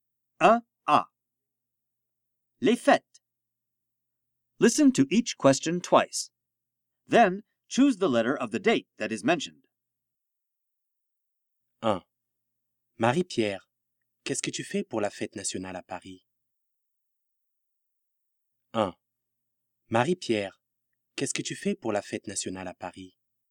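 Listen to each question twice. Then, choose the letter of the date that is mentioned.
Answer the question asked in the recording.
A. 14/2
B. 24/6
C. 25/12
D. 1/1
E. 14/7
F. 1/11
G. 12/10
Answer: E. 14/7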